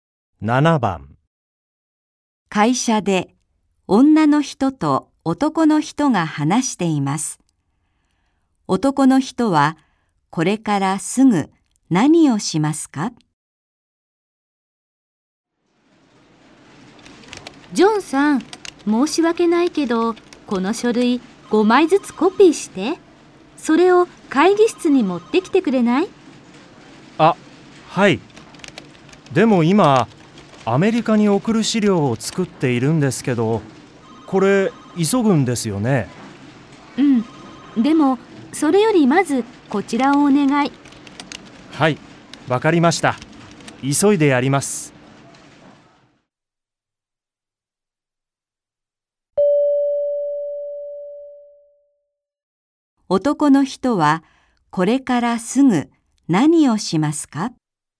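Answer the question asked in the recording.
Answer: 書類を5枚ずつコピーして会議室に持っていく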